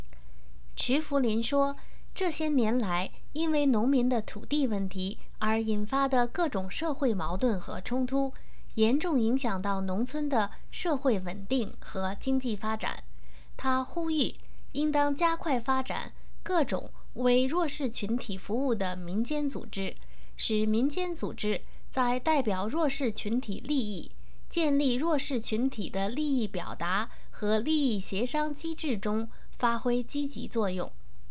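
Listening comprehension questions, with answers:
是什么问题严重影响了中国农村的社会稳定和经济发展?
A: 农民的土地问题引发的社会矛盾和冲突

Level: 3rd Year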